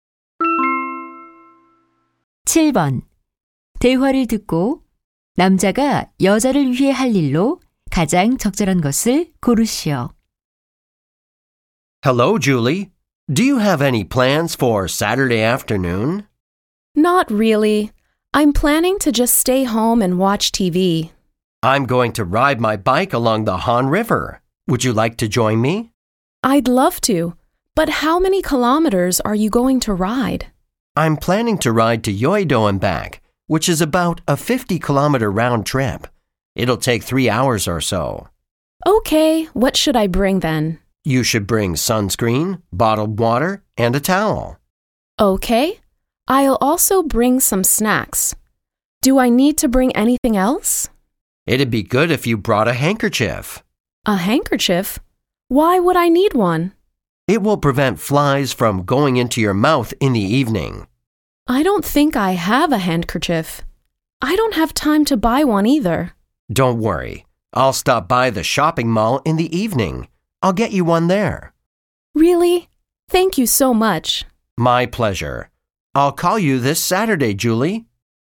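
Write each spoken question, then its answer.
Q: 대화를 듣고 남자가 여자를 위해 할 일로 가장 적절한 것을 고르시오.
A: 손수건 사다 주기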